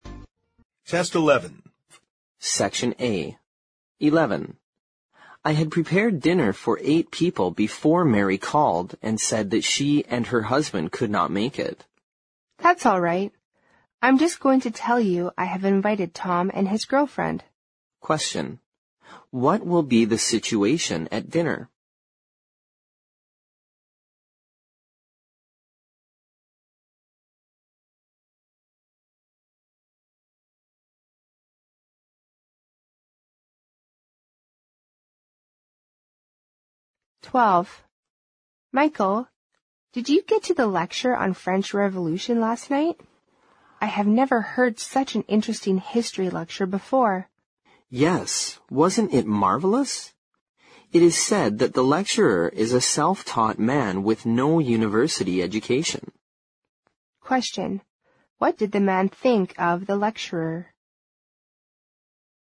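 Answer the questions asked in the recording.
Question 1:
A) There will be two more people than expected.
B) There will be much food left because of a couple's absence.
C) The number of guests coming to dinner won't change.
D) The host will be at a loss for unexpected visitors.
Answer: C) The number of guests coming to dinner won't change.
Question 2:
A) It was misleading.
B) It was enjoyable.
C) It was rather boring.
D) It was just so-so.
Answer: B) It was enjoyable.

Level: 六级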